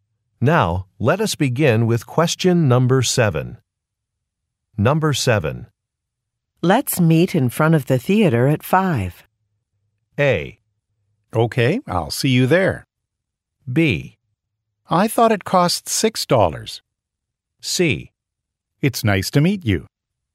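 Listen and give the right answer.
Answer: A: Okay, I'll see you there.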